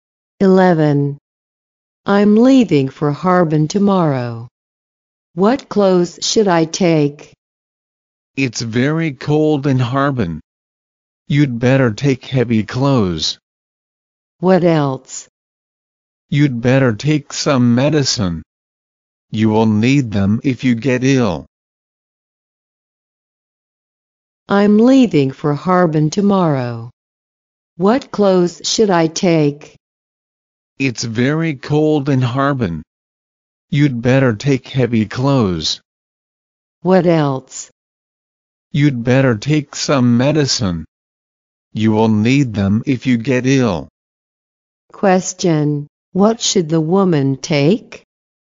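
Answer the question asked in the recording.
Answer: Heavy clothes and some medicine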